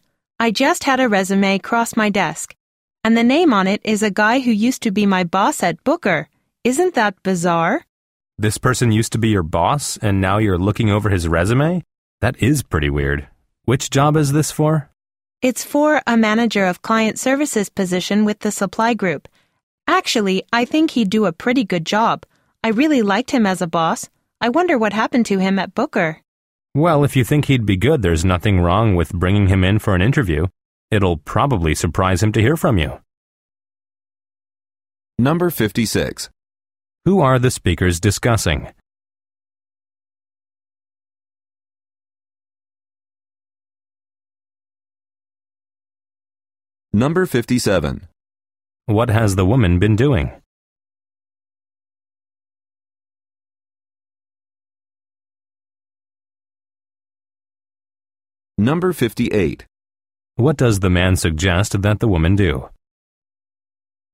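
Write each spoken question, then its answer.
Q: Who are the speakers discussing?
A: The woman's former boss at Booker, who is applying for a job

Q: What has the woman been doing?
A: Reviewing résumés for a manager of client services position

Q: What does the man suggest that the woman do?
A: Bring her former boss in for an interview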